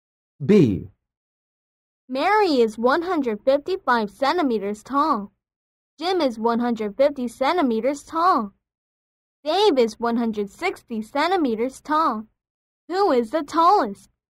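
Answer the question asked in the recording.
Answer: Dave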